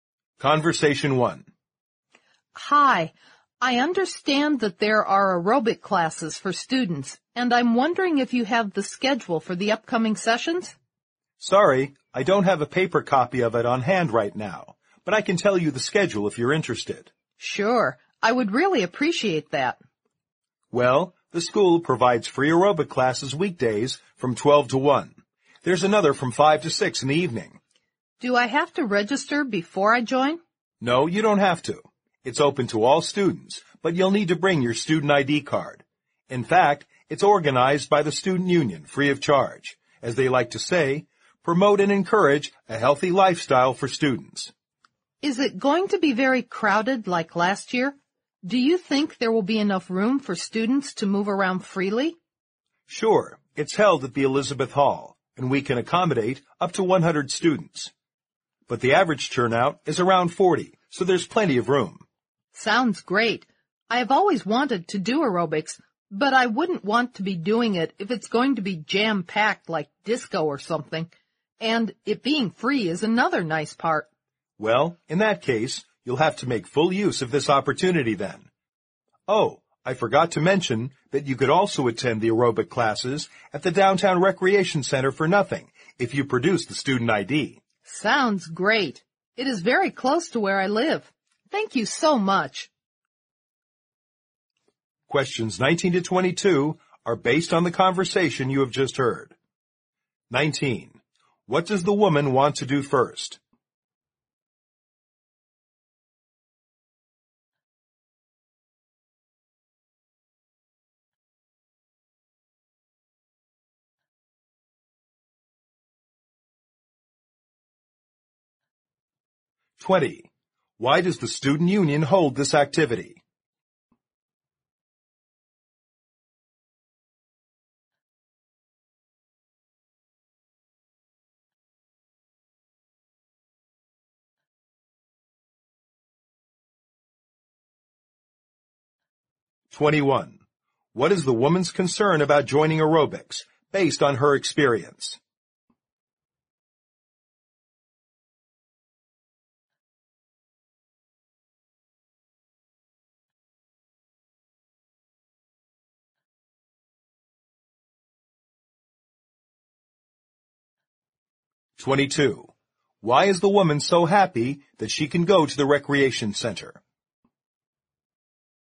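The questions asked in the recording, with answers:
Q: What does the woman want to do first?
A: Get the schedule of the aerobic classes

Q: Why does the student union hold this activity?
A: To promote and encourage a healthy lifestyle for students

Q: What is the woman's concern about joining aerobics, based on her experience?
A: That the class will be too crowded

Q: Why is the woman so happy that she can go to the recreation center?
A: It is free with her student ID and very close to where she lives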